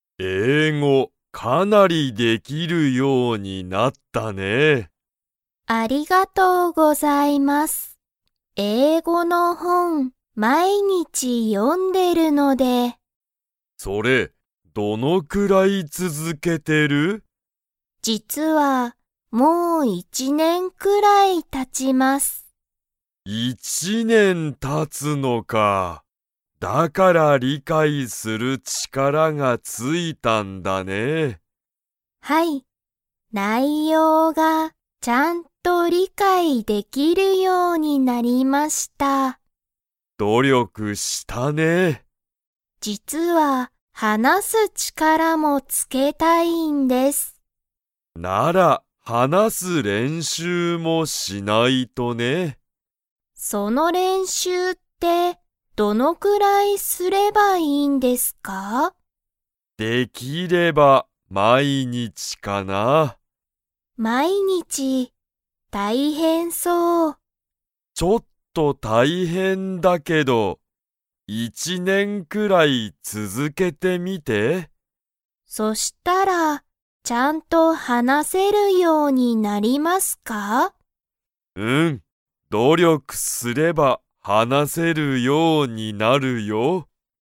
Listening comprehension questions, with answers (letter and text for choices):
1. 高井たかいさんは、英語えいごを 読よんでいる。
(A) 毎日まいにち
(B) 1日いちにちだけ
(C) 昨日きのうから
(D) 5年ごねん前まえから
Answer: (A) 毎日まいにち

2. 今いま、高井たかいさんは英語えいごを書かく力ちからを付つけたいですか?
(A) はい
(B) いいえ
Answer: (B) いいえ

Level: Level 3